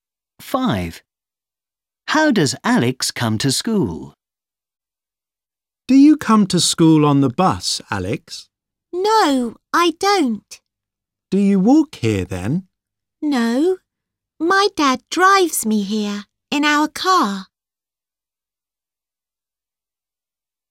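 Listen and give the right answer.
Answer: his dad drives him in their car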